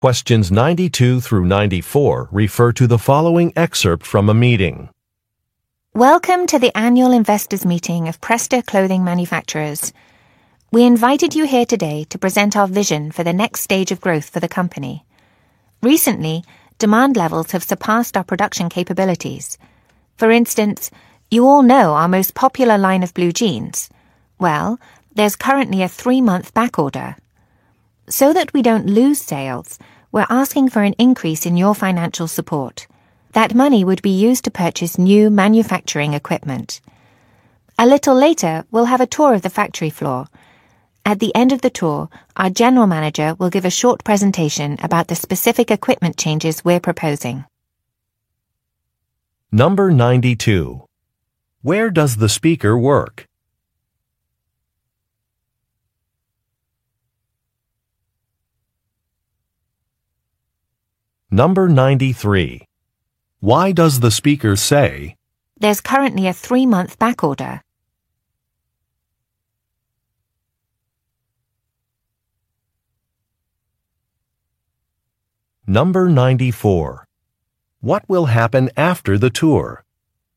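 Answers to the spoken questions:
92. At a clothing manufacturer
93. To show that demand exceeds production capacity
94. The general manager will give a presentation about proposed equipment changes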